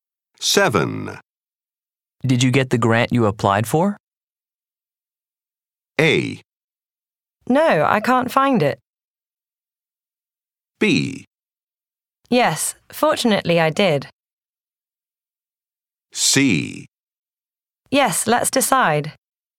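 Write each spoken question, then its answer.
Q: Did you get the grant you applied for?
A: B: Yes, fortunately I did.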